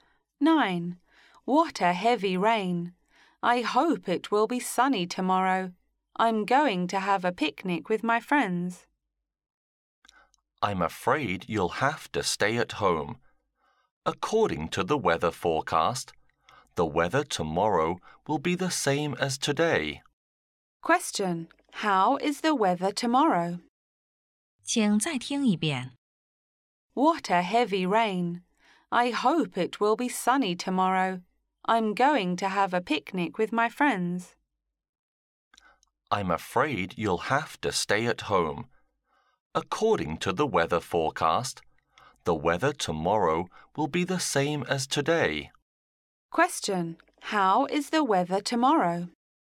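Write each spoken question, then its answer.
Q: How is the weather tomorrow?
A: Rainy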